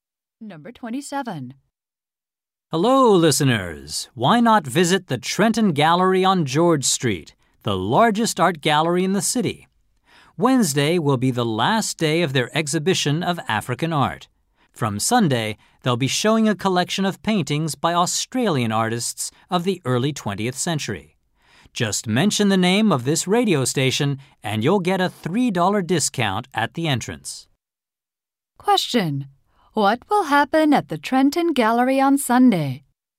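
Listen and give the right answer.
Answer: An exhibition of early 20th-century Australian paintings will start.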